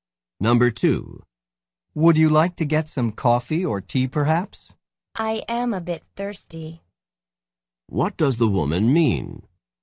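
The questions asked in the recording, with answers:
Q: What does the woman mean?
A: She would like something to drink.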